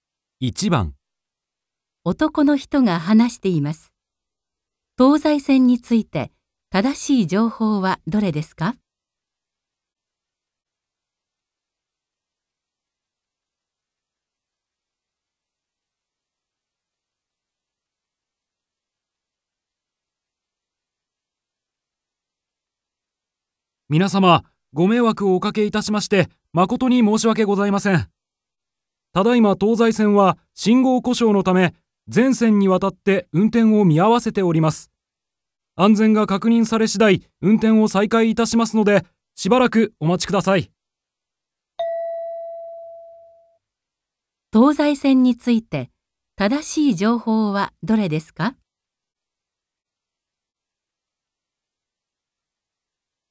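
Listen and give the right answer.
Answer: 信号故障のため、全線で運転を見合わせている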